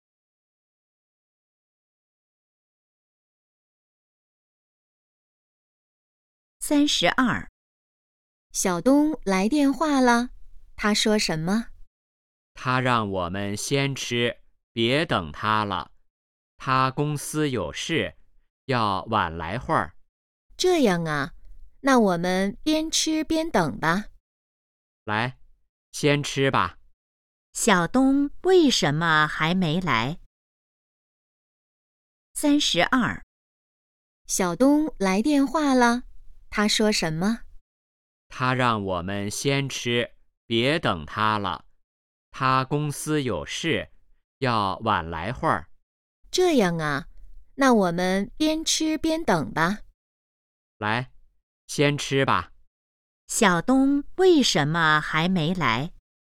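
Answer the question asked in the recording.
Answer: 公司有事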